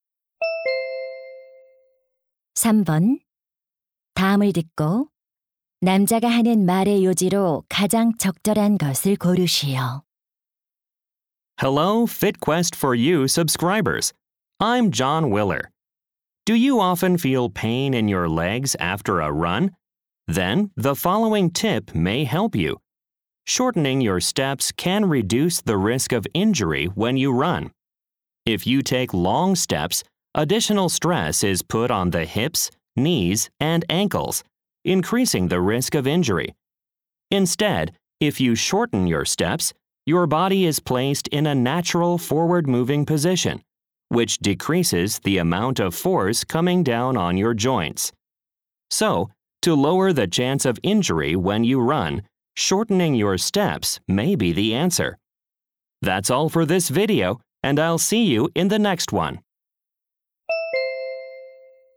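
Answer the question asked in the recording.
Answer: 달릴 때 보폭을 줄이면 부상 위험을 줄일 수 있다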